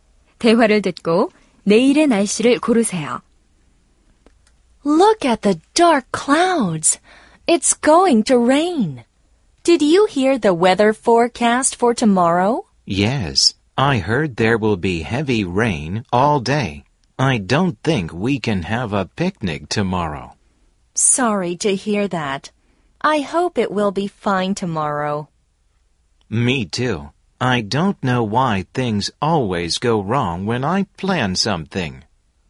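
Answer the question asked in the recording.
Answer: 하루 종일 비가 많이 옴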